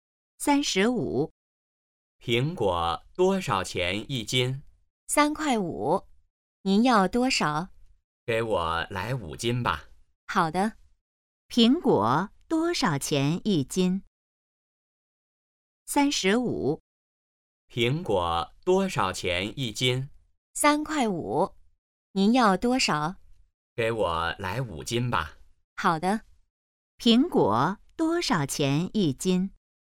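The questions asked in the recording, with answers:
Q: 苹果多少钱一斤?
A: 3.5元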